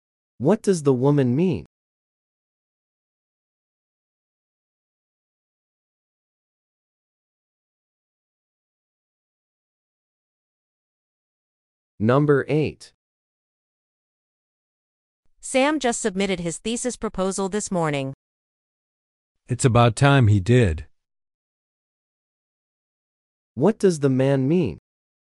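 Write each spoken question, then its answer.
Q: What does the man mean?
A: Sam should have submitted it earlier.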